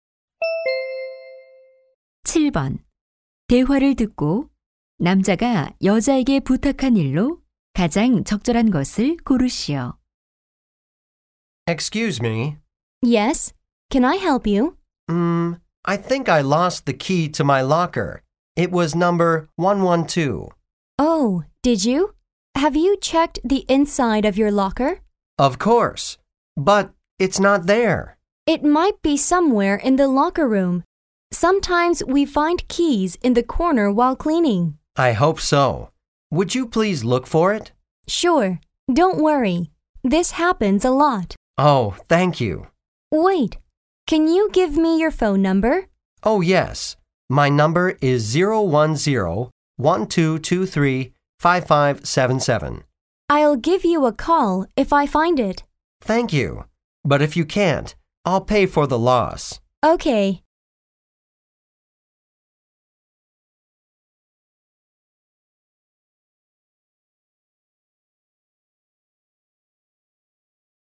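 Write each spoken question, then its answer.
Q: 대화를 듣고 남자가 여자에게 부탁한 일로 가장 적절한 것을 고르시오.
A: 잃어버린 사물함 열쇠 찾아 주기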